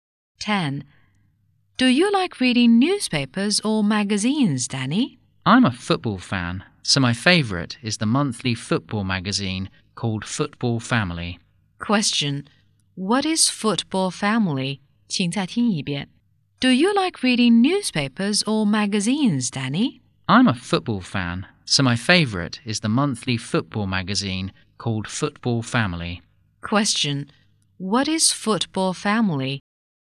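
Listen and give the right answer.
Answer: A monthly football magazine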